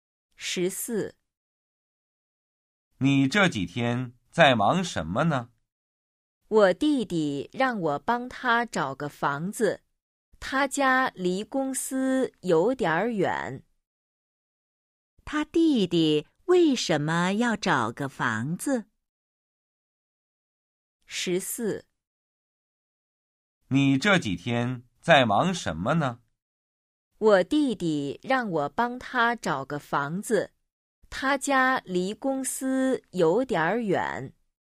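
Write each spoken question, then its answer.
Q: 他弟弟为什么要找个房子?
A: 他家离公司有点远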